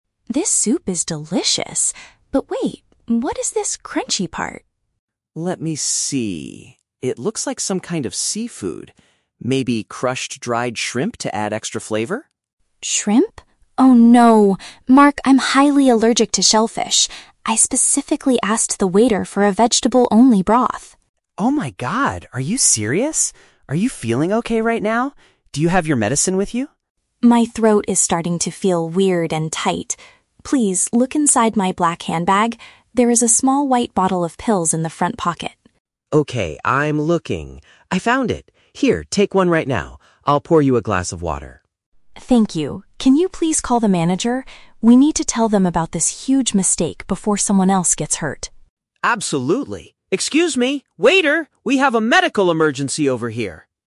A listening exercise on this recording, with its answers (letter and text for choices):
Listen to a conversation between two friends at a restaurant. For each question, choose the correct answer (A, B, or C).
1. What does Mark discover in Lisa's meal?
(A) Tiny pieces of an animal from the ocean.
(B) A dangerous chemical used for cooking.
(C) A large serving of undercooked vegetables.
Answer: (A) Tiny pieces of an animal from the ocean.

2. What was Lisa's instruction to the restaurant staff when she ordered?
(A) She asked them to remove the black bag from the table.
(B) She requested a soup made only from plants.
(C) She told them to boil her drinking water first.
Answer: (B) She requested a soup made only from plants.

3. What does Mark do to help Lisa immediately after she starts feeling sick?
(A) He drives her to the nearest medical center.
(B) He pays the manager and cancels their dinner.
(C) He searches her purse for a specific treatment.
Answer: (C) He searches her purse for a specific treatment.

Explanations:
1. Mark says the crunchy part looks like "crushed dried shrimp" (tiny pieces of an animal from the ocean). Option (B) is a trap; the situation is dangerous, but it is not a cooking chemical. Option (C) is a trap; vegetables are mentioned later as what she wanted, not what Mark found.
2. Lisa states, "I specifically asked the waiter for a vegetable-only broth" (a soup made only from plants). Option (A) is a trap; she tells Mark to look in her "black handbag" later, but she didn't ask the staff to remove it. Option (C) is a trap; Mark pours her a "glass of water," but she didn't ask the staff to boil it.
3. Lisa tells him to "look inside my black handbag" for a "bottle of pills", and Mark says "Okay, I'm looking... I found it!" (He searches her purse for a treatment). Option (A) is a trap; he shouts that they have a "medical emergency," but he doesn't drive her anywhere in the audio. Option (B) is a trap; they want to talk to the manager, but Mark hasn't paid or cancelled anything yet.

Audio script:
Lisa: This soup is delicious, but wait... what is this crunchy part?
Mark: Let me see. It looks like some kind of seafood. Maybe crushed dried shrimp to add extra flavor?
Lisa: Shrimp? Oh no! Mark, I'm highly allergic to shellfish! I specifically asked the waiter for a vegetable-only broth.
Mark: Oh my god, are you serious? Are you feeling okay right now? Do you have your medicine with you?
Lisa: My throat is starting to feel weird and tight. Please, look inside my black handbag. There is a small white bottle of pills in the front pocket.
Mark: Okay, I'm looking... I found it! Here, take one right now. I'll pour you a glass of water.
Lisa: Thank you. Can you please call the manager? We need to tell them about this huge mistake before someone else gets hurt.